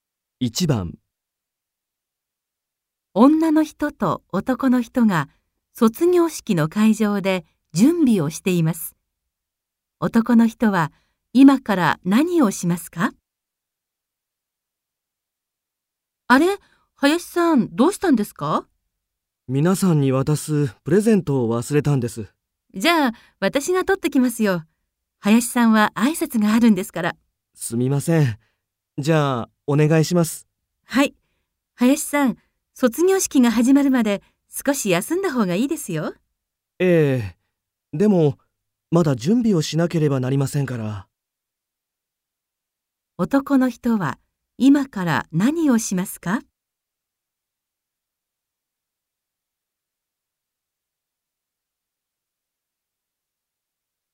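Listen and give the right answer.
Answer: プレゼントを取りに行く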